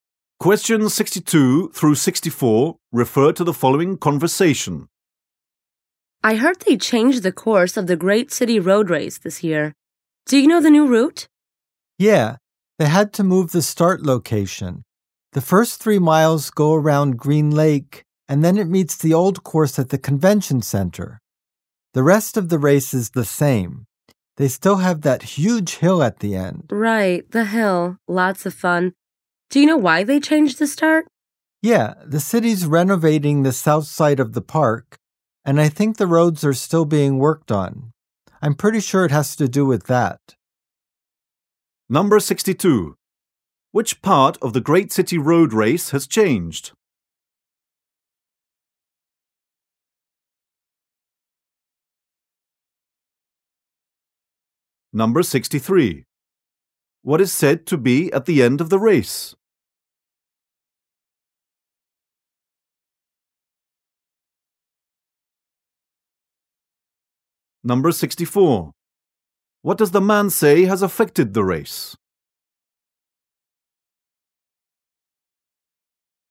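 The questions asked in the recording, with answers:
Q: Which part of the Great City Road Race has changed?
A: The start location

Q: What is said to be at the end of the race?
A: A huge hill

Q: What does the man say has affected the race?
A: Renovation work in the park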